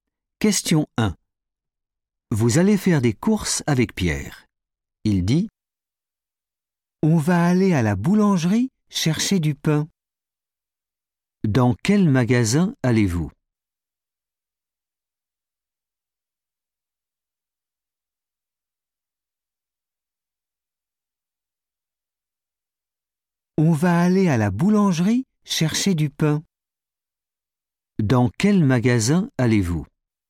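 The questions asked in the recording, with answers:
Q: Dans quel magasin allez-vous ?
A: la boulangerie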